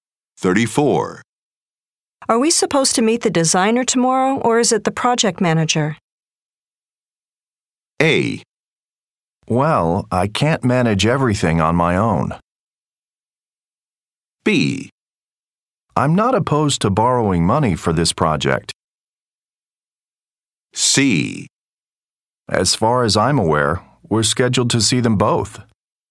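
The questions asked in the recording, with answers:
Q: Are we supposed to meet the designer tomorrow, or is it the project manager?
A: C: As far as I'm aware, we're scheduled to see them both.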